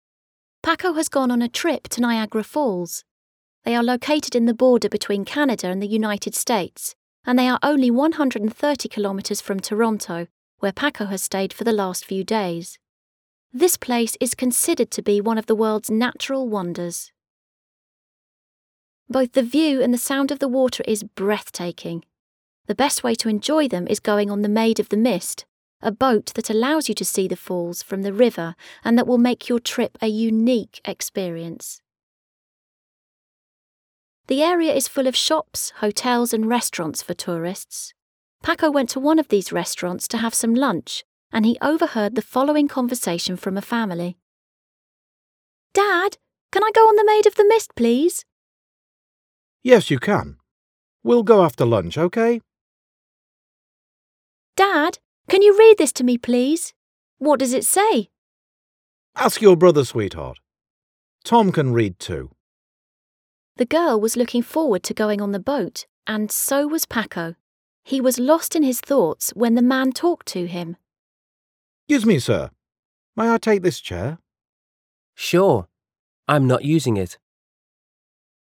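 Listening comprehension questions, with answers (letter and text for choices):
Listen to the text again and choose the best option to complete the sentences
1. Niagara Falls are 130 Km far from ...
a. Ottawa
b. Toronto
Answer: b. Toronto

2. The Maid of the Mist is ...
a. a hotel with a wonderful view of the Falls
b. a boat that gives you a close-up experience of Niagara Falls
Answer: b. a boat that gives you a close-up experience of Niagara Falls

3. Around the Falls ...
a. there's a great variety of shops, hotels and restaurants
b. there are no other places to go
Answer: a. there's a great variety of shops, hotels and restaurants

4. While Paco is having lunch ...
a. a man talks to him about the Falls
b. a man requests his permission to take a chair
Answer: b. a man requests his permission to take a chair

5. Paco ...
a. would like to take a boat ride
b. is not interested in taking a boat ride at all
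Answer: a. would like to take a boat ride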